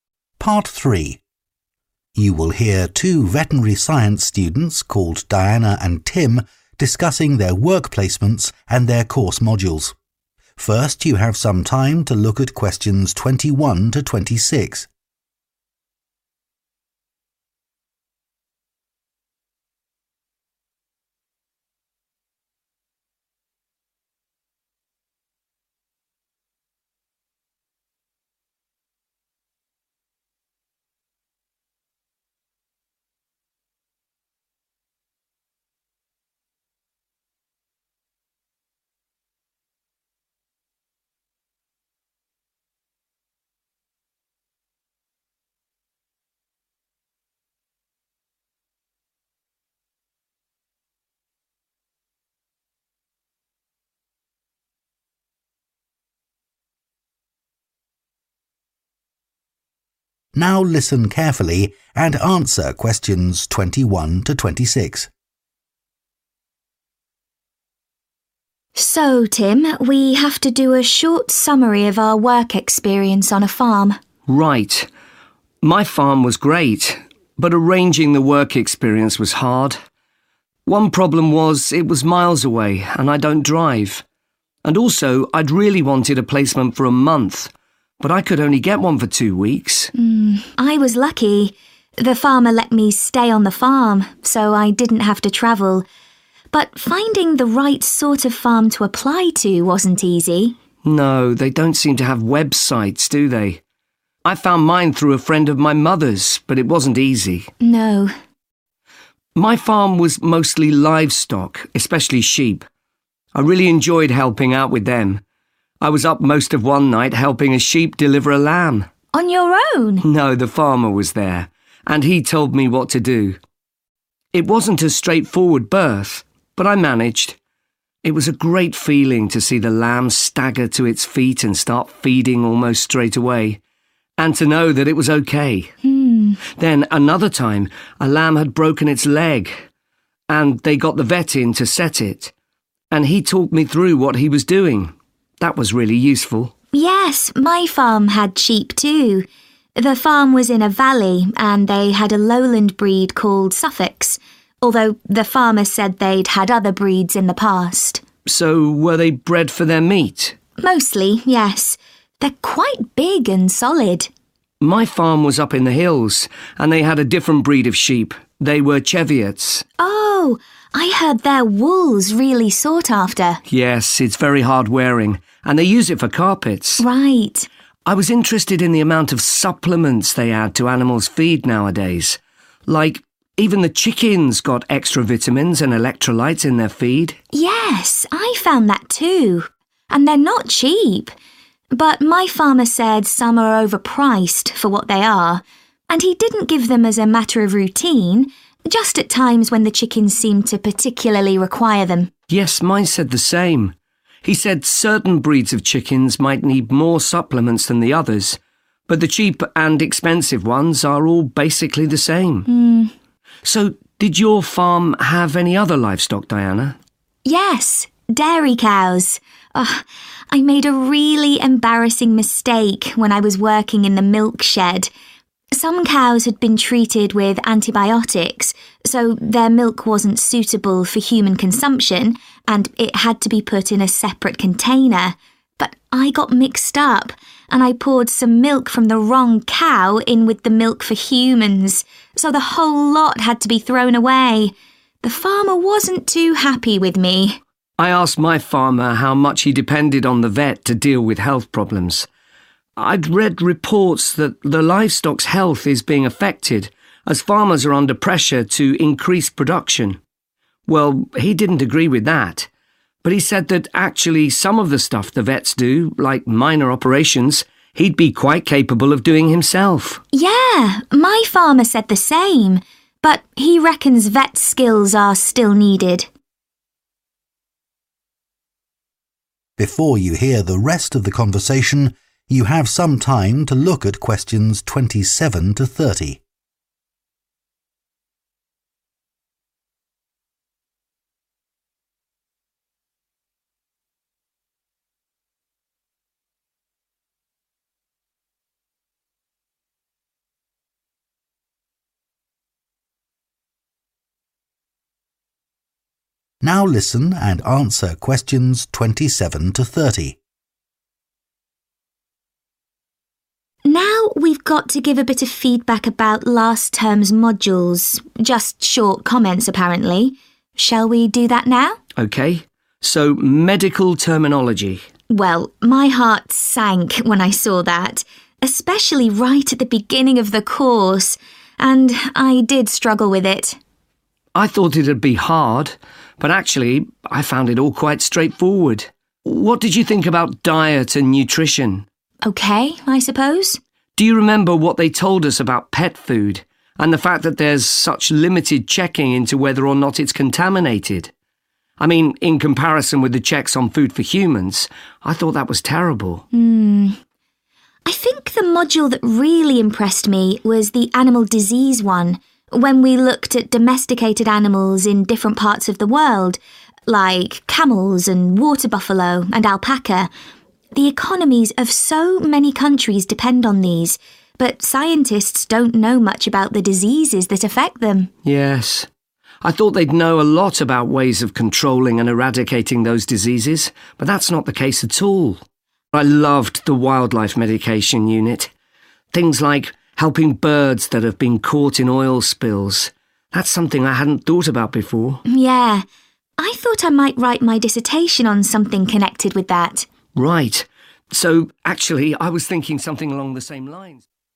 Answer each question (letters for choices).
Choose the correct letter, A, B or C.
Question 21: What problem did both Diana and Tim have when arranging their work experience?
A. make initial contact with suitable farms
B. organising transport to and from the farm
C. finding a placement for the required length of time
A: A

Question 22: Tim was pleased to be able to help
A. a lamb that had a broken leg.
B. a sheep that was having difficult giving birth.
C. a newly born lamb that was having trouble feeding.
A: B

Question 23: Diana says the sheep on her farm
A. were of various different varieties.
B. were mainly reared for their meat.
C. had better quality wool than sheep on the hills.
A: B

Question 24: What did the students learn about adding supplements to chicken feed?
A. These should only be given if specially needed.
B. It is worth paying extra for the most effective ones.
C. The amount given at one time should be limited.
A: A

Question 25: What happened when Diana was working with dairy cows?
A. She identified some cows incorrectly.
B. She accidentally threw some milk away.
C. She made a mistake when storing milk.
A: C

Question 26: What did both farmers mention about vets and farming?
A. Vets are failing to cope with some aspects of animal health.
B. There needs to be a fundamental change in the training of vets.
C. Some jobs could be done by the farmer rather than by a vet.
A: C

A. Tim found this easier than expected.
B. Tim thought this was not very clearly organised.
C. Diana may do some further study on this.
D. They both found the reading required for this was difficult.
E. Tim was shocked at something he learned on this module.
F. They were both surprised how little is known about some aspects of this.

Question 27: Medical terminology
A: A

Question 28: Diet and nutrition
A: E

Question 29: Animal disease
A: F

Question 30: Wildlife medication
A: C